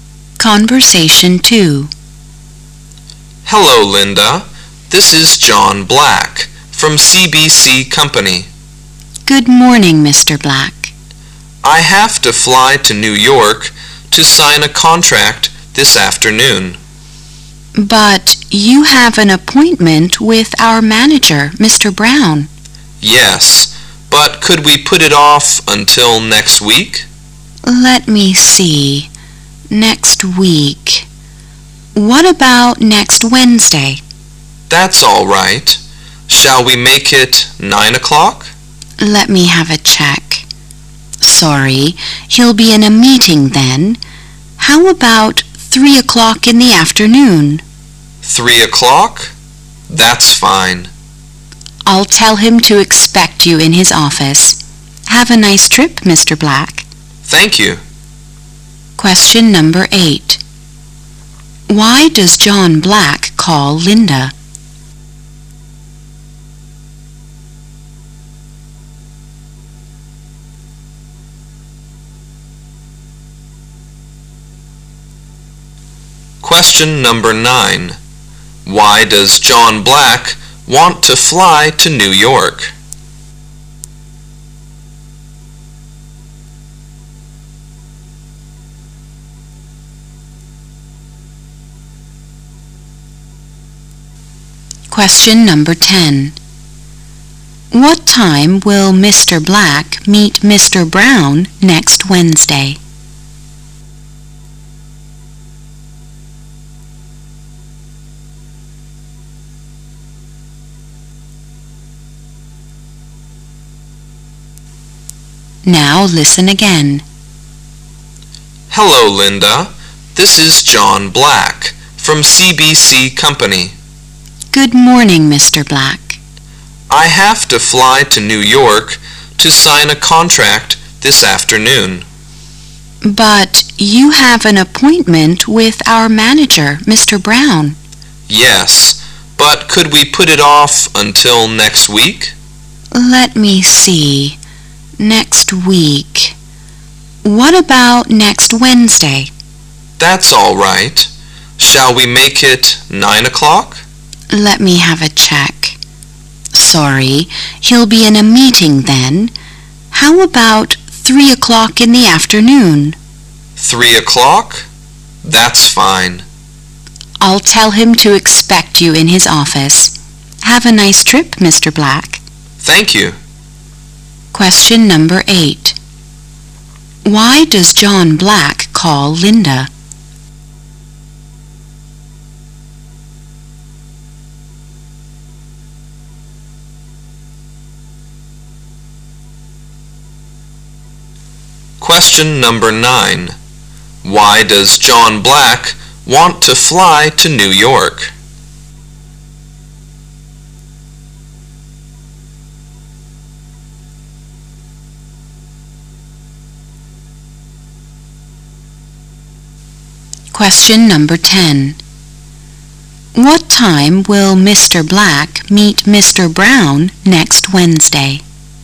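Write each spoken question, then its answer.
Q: Why does John Black call Linda?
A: To put off his appointment with Mr. Brown

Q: Why does John Black want to fly to New York?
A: To sign a contract

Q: What time will Mr. Black meet Mr. Brown next Wednesday?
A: 3 o'clock in the afternoon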